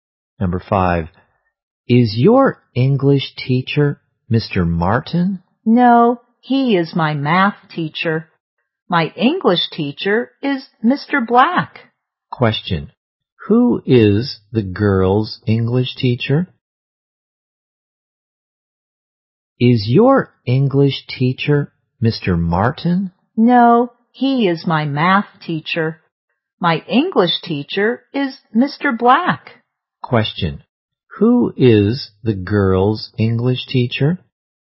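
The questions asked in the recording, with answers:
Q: who is the girl's English teacher?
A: Mr. Black.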